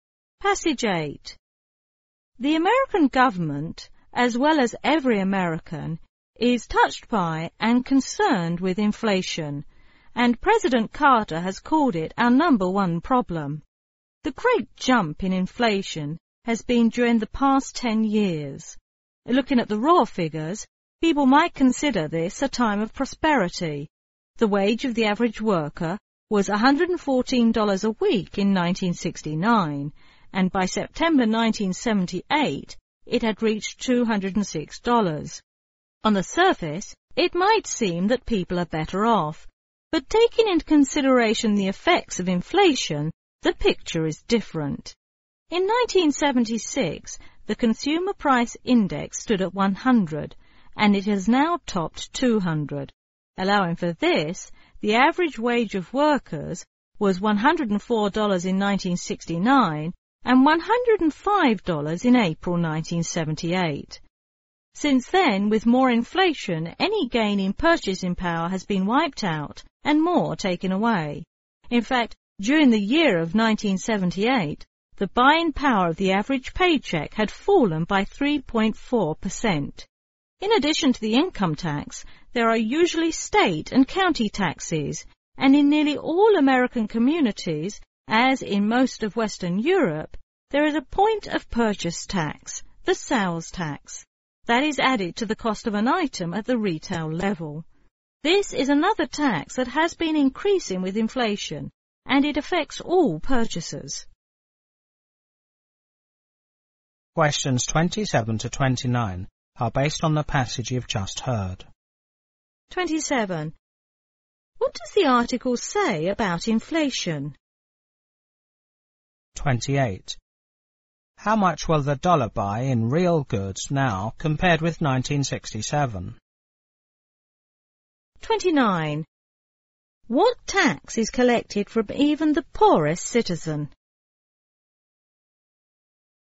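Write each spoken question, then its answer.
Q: What tax is collected from even the poorest citizen?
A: The sales tax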